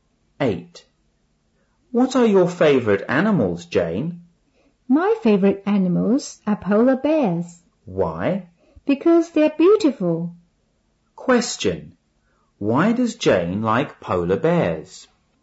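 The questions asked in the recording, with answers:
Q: Why does Jane like polar bears?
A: Because they're beautiful.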